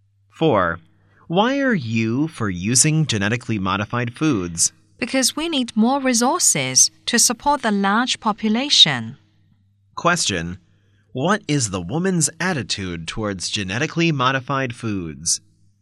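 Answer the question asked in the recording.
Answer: She supports them, because more resources are needed for the large population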